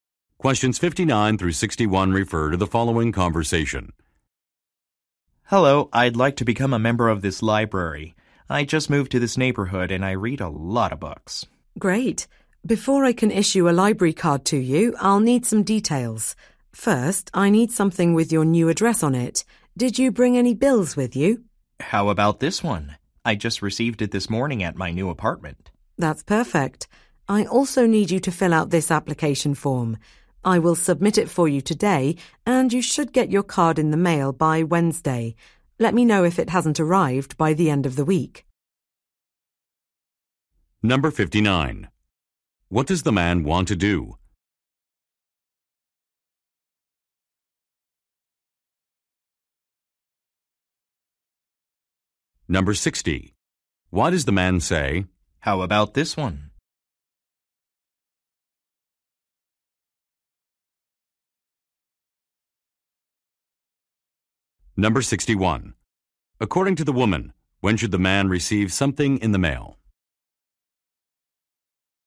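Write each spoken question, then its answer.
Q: What does the man want to do?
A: Get a library membership

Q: Why does the man say,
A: To offer a bill showing his new address

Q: According to the woman, when should the man receive something in the mail?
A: By Wednesday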